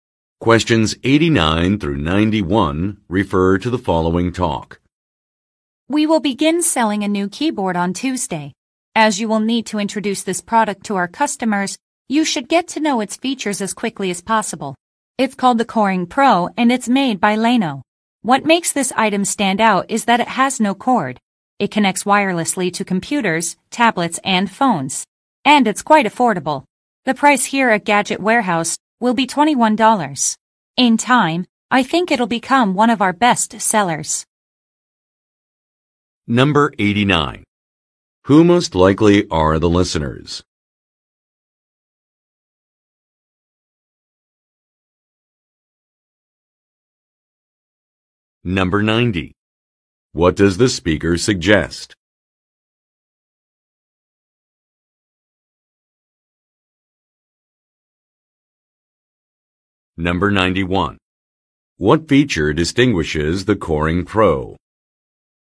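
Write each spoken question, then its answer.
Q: Who most likely are the listeners?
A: Salespeople at an electronics store (Gadget Warehouse)

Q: What feature distinguishes the Coring Pro?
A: It has no cord; it connects wirelessly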